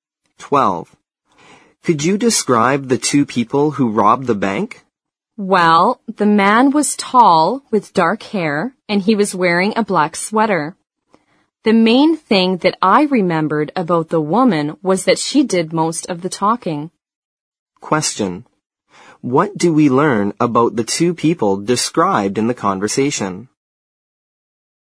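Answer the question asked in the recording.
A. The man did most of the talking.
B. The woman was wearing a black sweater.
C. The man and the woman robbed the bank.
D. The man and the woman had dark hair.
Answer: C. The man and the woman robbed the bank.

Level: 四级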